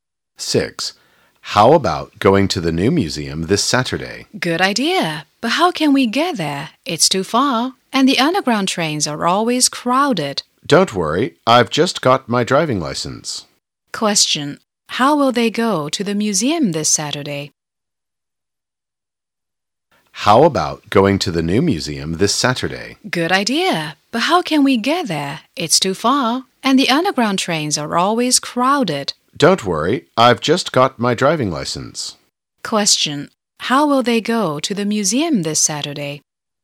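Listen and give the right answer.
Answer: By car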